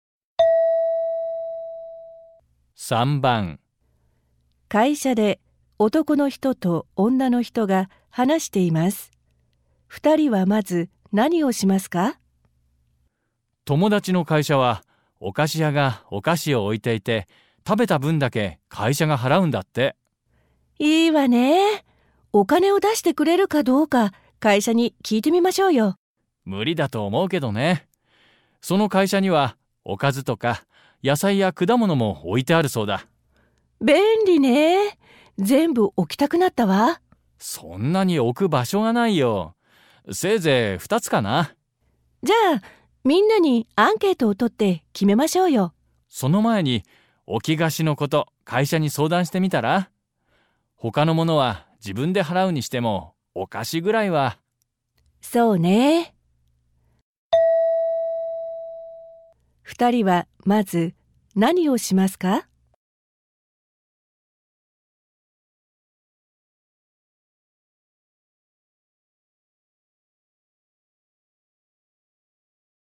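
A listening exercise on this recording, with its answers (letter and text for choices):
問題1では、まず質問を聞いてください。それから話を聞いて、問題用紙の1から4の中から、最もよいものを一つ選んでください。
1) 二人はまず何をしますか。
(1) 会社にお菓子を置いてもいいか聞く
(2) 置き菓子代の支払いを会社に頼む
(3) おやつを買うように会社に頼む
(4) 社員に何を置いてほしいか聞く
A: (2) 置き菓子代の支払いを会社に頼む

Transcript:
会社で男の人と女の人が話しています。二人はまず何をしますか。
M:友達の会社はお菓子屋がお菓子を置いていて、食べた分だけ会社が払うんだって。
F:いいわね。お金を出してくれるかどうか会社に聞いてみましょうよ。
M:無理だと思うけどね。その会社にはおかずとか野菜や果物も置いてあるそうだ。
F:便利ね。全部置きたくなったわ。/Tiện nhỉ. Muốn để hết quá!
M:そんなに置く場所がないよ。せいぜい2つかな。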